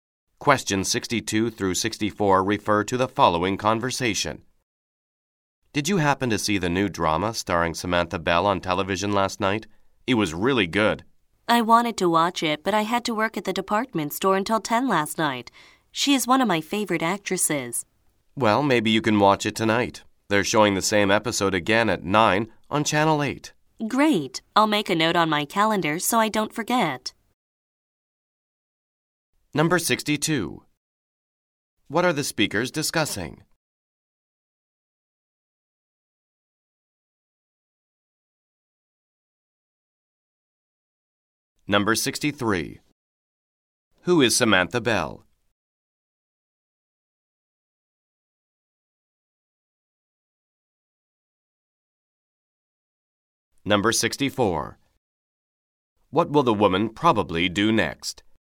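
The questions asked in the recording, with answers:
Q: What are the speakers discussing?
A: A new TV drama

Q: Who is Samantha Bell?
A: An actress

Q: What will the woman probably do next?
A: Make a note on her calendar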